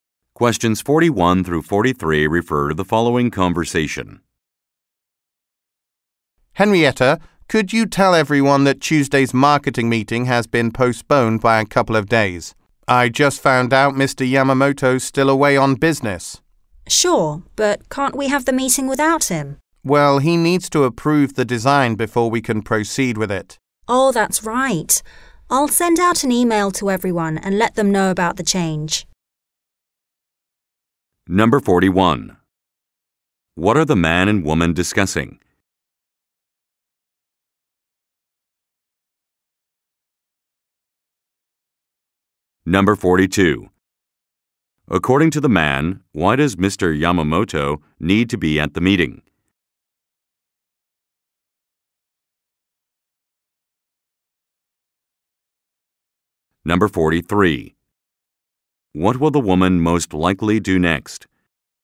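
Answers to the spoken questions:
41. A postponed marketing meeting
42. He needs to approve the design
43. Send an email to everyone about the change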